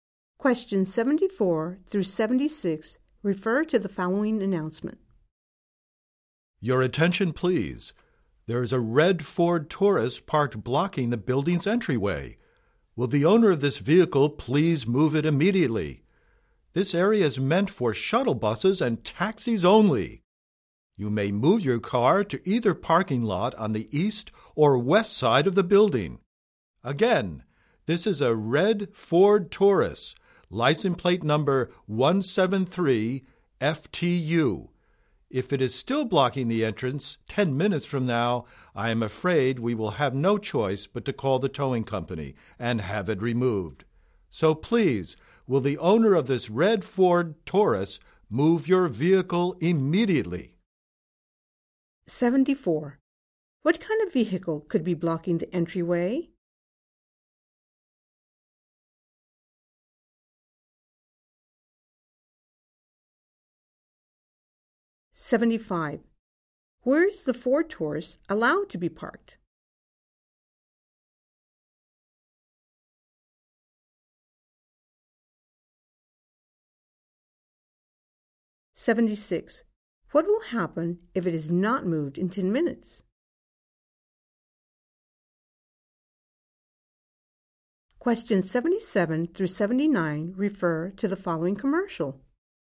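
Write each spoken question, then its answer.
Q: What kind of vehicle could be blocking the entryway?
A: A red Ford Taurus

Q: Where is the Ford Taurus allowed to be parked?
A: In the parking lot on the east or west side of the building

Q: What will happen if it is not moved in 10 minutes?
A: It will be towed away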